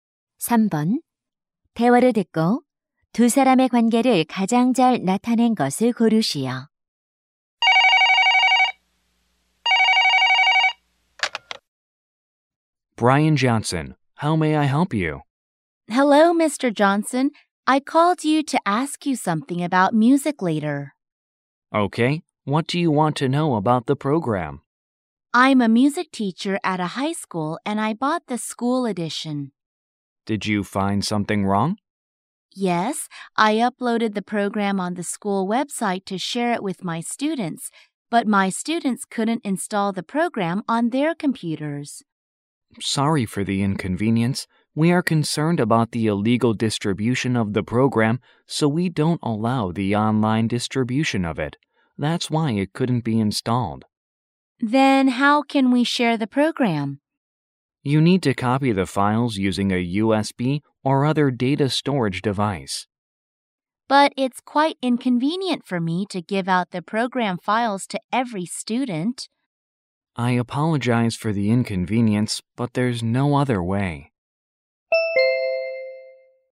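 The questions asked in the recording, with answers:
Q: 대화를 듣고 두 사람의 관계를 가장 잘 나타낸 것을 고르시오.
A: 음악 교사(프로그램 구매 고객)와 소프트웨어 회사 직원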